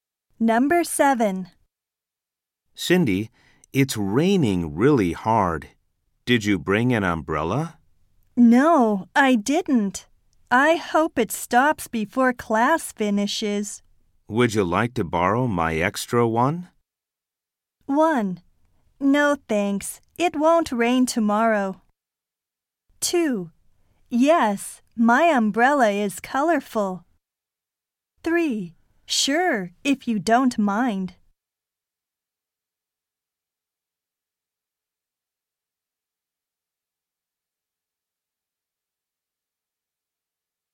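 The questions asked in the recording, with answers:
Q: Would you like to borrow my extra one?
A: 3: Sure, if you don't mind.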